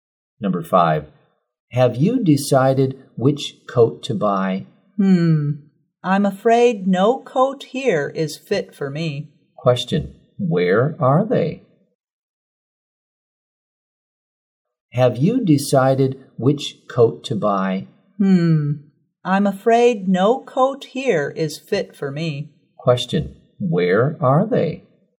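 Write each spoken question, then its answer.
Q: Question, where are they?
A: In a clothes store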